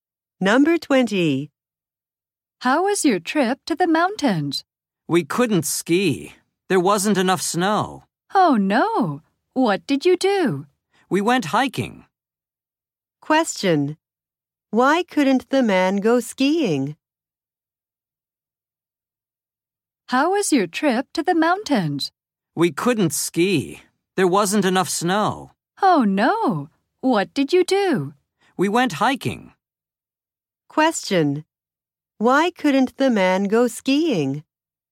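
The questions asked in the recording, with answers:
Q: Why couldn't the man go skiing?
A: There wasn't enough snow.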